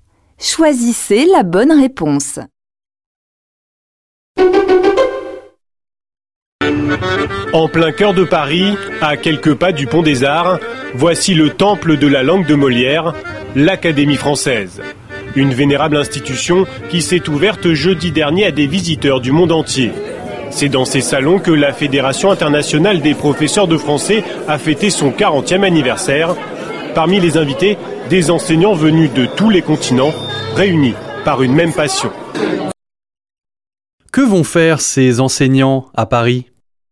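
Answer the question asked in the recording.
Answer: Fêter le 40e anniversaire de la Fédération internationale des professeurs de français à l'Académie française.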